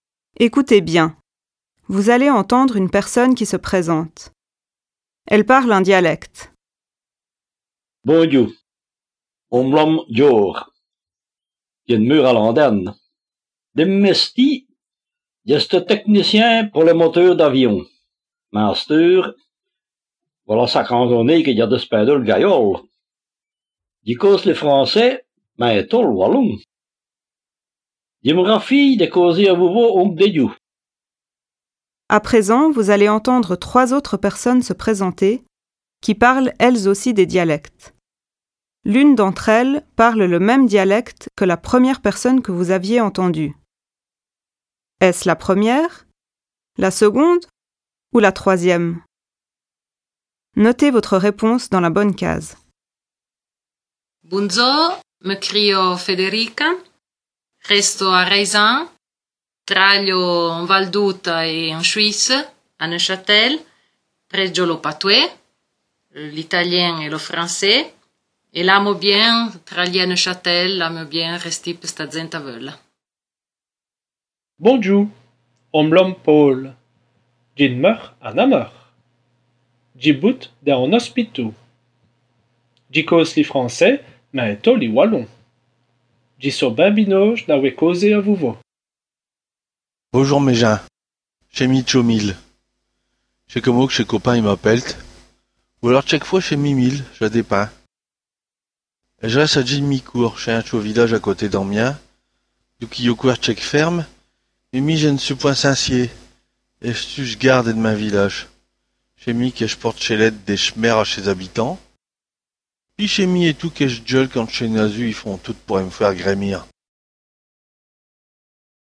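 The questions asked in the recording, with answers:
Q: Est-ce la première, la seconde ou la troisième?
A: La seconde (Paul, de Namur, qui parle wallon)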